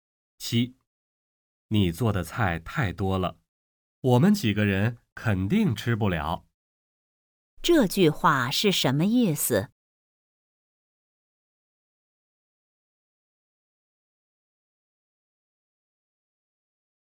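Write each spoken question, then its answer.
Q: 这句话是什么意思?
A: 菜太多,吃不完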